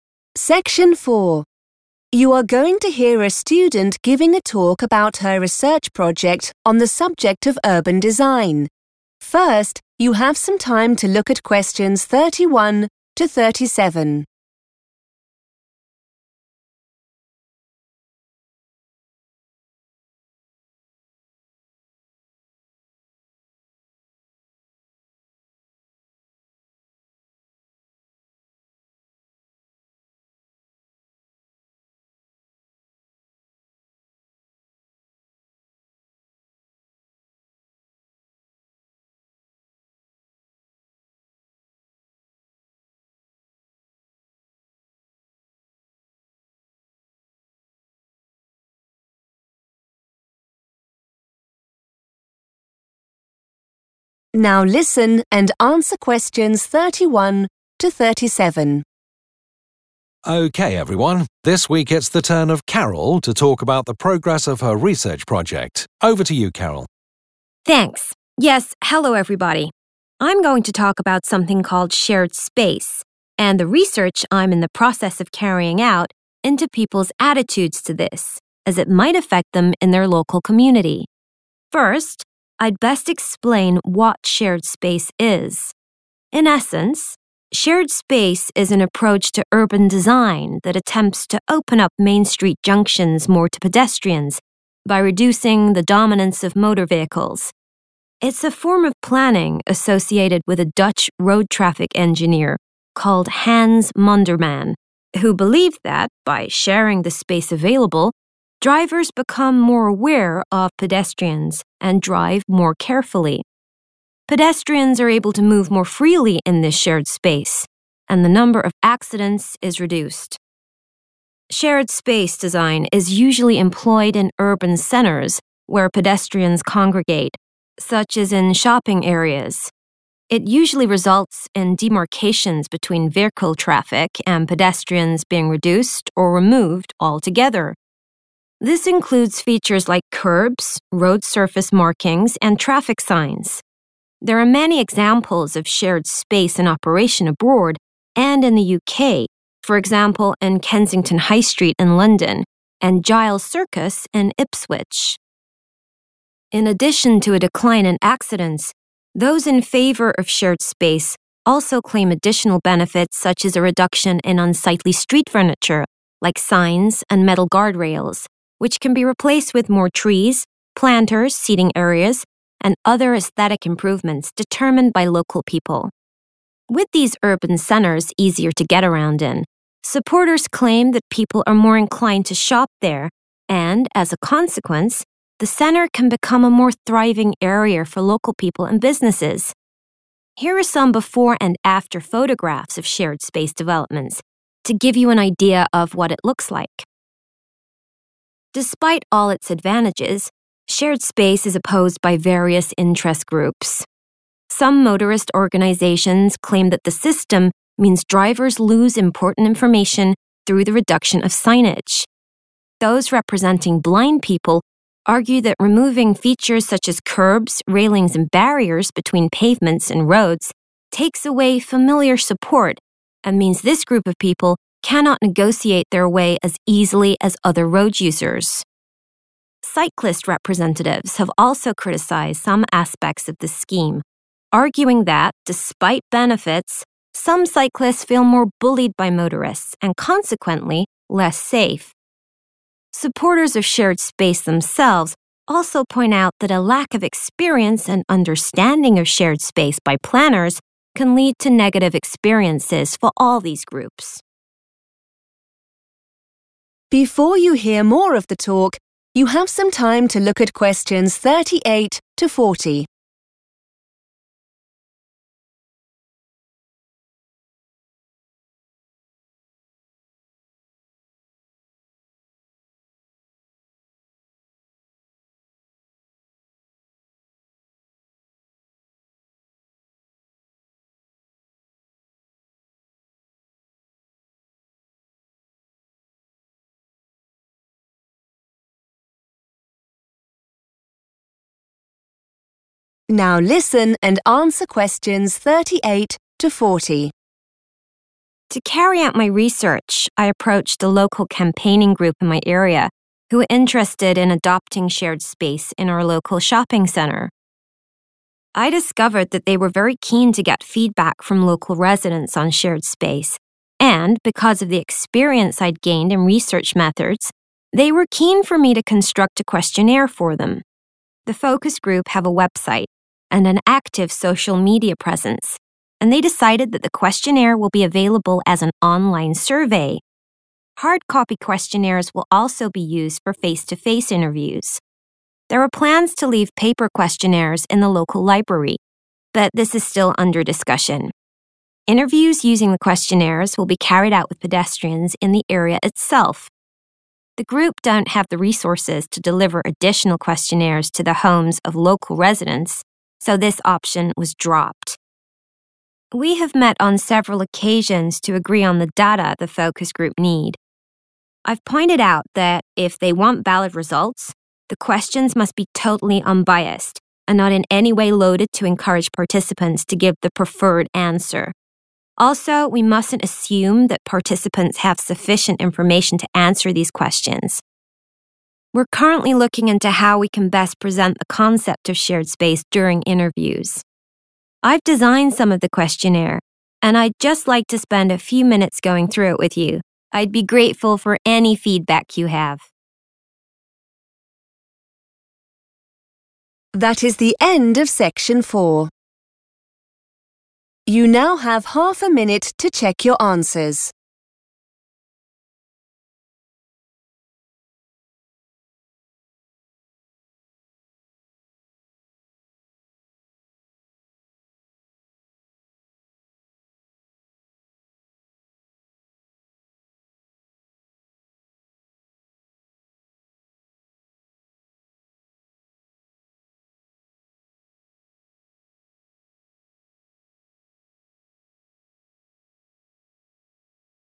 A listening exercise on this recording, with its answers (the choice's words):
Choose the correct letter, A, B or C.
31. According to the text, shared space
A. is very popular in the Netherlands.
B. reduces the number of cars in an area.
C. improves the dynamic between drivers and pedestrians.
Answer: improves the dynamic between drivers and pedestrians.

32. Shared space design results in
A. fewer road signs.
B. stronger boundaries between pedestrians and motorists.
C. increased local employment.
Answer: fewer road signs.

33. Supporters of shared space argue that it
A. leads to new businesses opening.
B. makes people happier to shop in the area.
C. encourages wildlife.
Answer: makes people happier to shop in the area.

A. Motorists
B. Blind people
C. Cyclists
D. Supporters of shared space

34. Insufficient experience amongst planners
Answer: Supporters of shared space

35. A lack of important signage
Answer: Motorists

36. Intimidation by motorists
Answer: Cyclists

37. The loss of familiar street furniture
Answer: Blind people

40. Questions must be designed so that they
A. do not reflect the views of the campaign group.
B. do not require an understanding of shared space.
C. are easy to answer.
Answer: do not reflect the views of the campaign group.

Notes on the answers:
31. The correct answer is Choice C because the transcript describes how shared space changes behavior. It mentions that drivers become 'more aware' of people walking and they 'drive more carefully.' It also says that pedestrians can 'move more freely.' These changes show a better relationship, or dynamic, between the cars and the people on foot compared to traditional road designs.
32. The correct answer is A because the transcript explains that shared space design reduces or completely removes the things that usually separate cars from people. One of the main things mentioned that get removed or reduced are traffic signs. The text also mentions a "reduction" in street furniture like signs. Therefore, the result is having fewer signs.
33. The correct answer is B because the transcript states that people who support the idea believe it makes shoppers more willing to visit. Keywords like "inclined to shop" mean that people have a positive feeling or tendency to go there to buy things. This matches the idea of being "happier" or more eager to shop there. While the text says the area will be "thriving" (doing well) for businesses, it doesn't specifically say "new" businesses will open (choice A), and mentioning "trees" is not the same as encouraging "wildlife" (choice C).
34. The correct answer is D because the speaker says that even the people who think shared spaces are good (the supporters) have worries. They mention that if the people who design the roads and cities (the planners) do not have enough practice or knowledge, it can create bad situations for everyone. In this context, "lack of experience" means the same thing as "insufficient experience."
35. The correct answer is A because the talk mentions that groups representing drivers worry about having fewer signs on the road. They feel that removing signs takes away useful information they need while driving. In the transcript, 'motorist organisations' are the groups for drivers, and 'reduction of signage' means there is a lack of signs.
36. The correct answer is C because the text mentions that people representing cyclists have concerns. They believe that even though there are good things about shared space, some people riding bikes feel bullied by car drivers. This feeling of being bullied is the same as feeling direct intimidation. Therefore, cyclists are the group concerned about being intimidated by motorists.
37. The correct answer is B because the transcript explains that blind people have trouble when things like curbs (kerbs) and fences (railings) are removed. These items are called 'familiar support' in the text, which matches 'familiar street furniture' in the question. Without these items, blind people find it harder to walk safely around the streets compared to other people. The keyword 'removing features' explains the 'loss' mentioned in the question.
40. The correct answer is A because Carol says the questions must be "totally unbiased" so the results are correct. This means the questions should not be written in a way that makes people choose the answer the group wants. In English, if something is "unbiased," it is fair and does not follow a specific side or view. The phrase "not in any way loaded to encourage participants to give the 'preferred' answer" means the questions should not reflect what the campaign group thinks is right.

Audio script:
Tutor: Okay everyone. This week it's the turn of Carol to talk about the progress of her research project. Over to you Carol.
Carol: Thanks. Yes, hello everybody. I'm going to talk about something called 'shared space' and the research I'm in the process of carrying out into people's attitudes to this as it might affect them in their local community.
First I'd best explain what shared space is. In essence, shared space is an approach to urban design that attempts to open up main street junctions more to pedestrians by reducing the dominance of motor vehicles. It's a form of planning associated with a Dutch road traffic engineer called Hans Monderman, who believed that by sharing the space available drivers become more aware of pedestrians and drive more carefully. Pedestrians are able to move more freely in this shared space and the number of accidents is reduced.
Shared space design is usually employed in urban centres where pedestrians congregate, such as in shopping areas. It usually results in demarcations between vehicle traffic and pedestrians being reduced or removed altogether. This includes features like kerbs, road surface markings and traffic signs. There are many examples of shared space in operation abroad and in the UK, for example in Kensington High Street in London and Giles Circus in Ipswich.
In addition to a decline in accidents, those in favour of shared space also claim additional benefits such as a reduction in unsightly street furniture like signs and metal guard rails, which can be replaced with more trees, planters, seating areas, and other aesthetic improvements determined by local people. With these urban centres easier to get around in, supporters claim that people are more inclined to shop there and as a consequence the centre can become a more thriving area for local people and businesses. Here are some before-and-after photographs of shared space developments to give you an idea of what it looks like ...
Despite all its advantages, shared space is opposed by various interest groups. Some motorist organisations claim that the system means drivers lose important information through the reduction of signage. Those representing blind people argue that removing features such as kerbs, railings and barriers between pavements and roads takes away familiar support and means this group of people cannot negotiate their way as easily as other road users. Cyclist representatives have also criticised some aspects of the scheme arguing that despite benefits some cyclists feel more bullied by motorists and consequently less safe. Supporters of shared space themselves also point out that a lack of experience and understanding of shared space by planners can lead to negative experiences for all these groups.
To carry out my research I approached a local campaigning group in my area who are interested in adopting shared space in our local shopping centre. I discovered that they were very keen to get feedback from local residents on shared space and because of the experience I'd gained in research methods they were keen for me to construct a questionnaire for them. The focus group have a website and an active social media presence and they decided that the questionnaire will be available as an online survey. Hard-copy questionnaires will also be used for face-to-face interviews. There were plans to leave paper questionnaires in the local library but this is still under discussion. Interviews using the questionnaires will be carried out with pedestrians in the area itself. The group don't have the resources to deliver additional questionnaires to the homes of local residents so this option was dropped.
We have met on several occasions to agree on the data the focus group need. I've pointed out that, if they want valid results, the questions must be totally unbiased and not in any way loaded to encourage participants to give the 'preferred' answer. Also we mustn't assume that participants have sufficient information to answer these questions. We're currently looking into how we can best present the concept of shared space during interviews.
I've designed some of the questionnaire and I'd just like to spend a few minutes going through it with you. I'd be grateful for any feedback you have ...